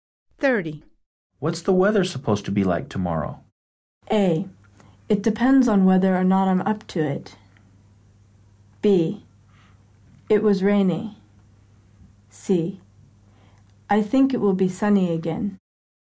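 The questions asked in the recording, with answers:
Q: What's the weather supposed to be like tomorrow?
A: C: I think it will be sunny again.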